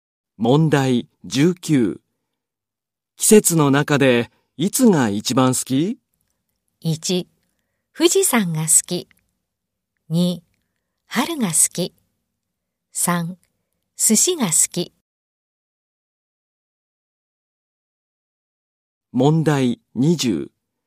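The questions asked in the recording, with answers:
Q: 季節の中でいつが一番好き?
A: 2: 春が好き。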